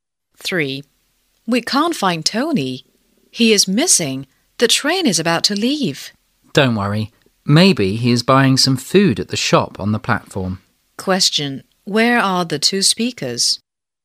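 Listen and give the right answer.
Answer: At a train station (on the platform)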